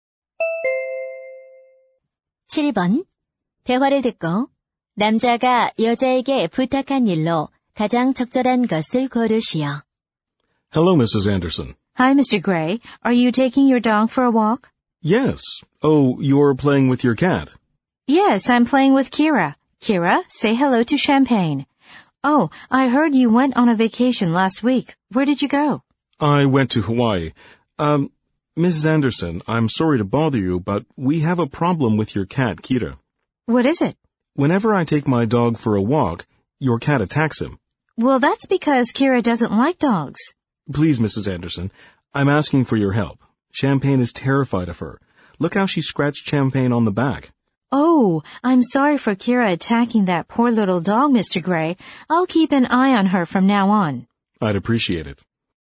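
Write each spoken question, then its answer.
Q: 대화를 듣고 남자가 여자에게 부탁한 일로 가장 적절한 것을 고르시오.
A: 고양이가 개를 공격하지 않도록 잘 지켜봐 달라는 것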